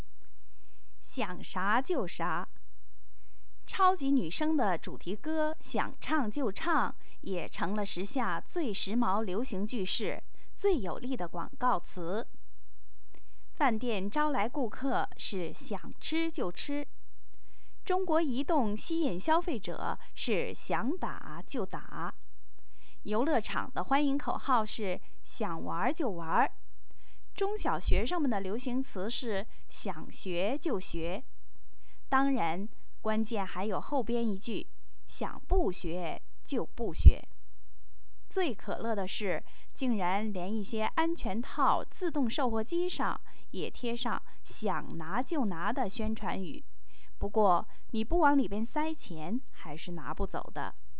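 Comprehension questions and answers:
Please answer the following questions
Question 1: "超级女声"的主题歌是什么?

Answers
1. 《想唱就唱》

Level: 3rd Year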